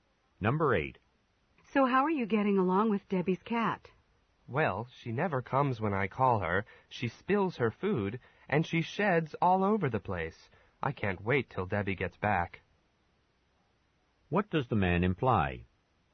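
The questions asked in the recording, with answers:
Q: What does the man imply?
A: He doesn't like taking care of the cat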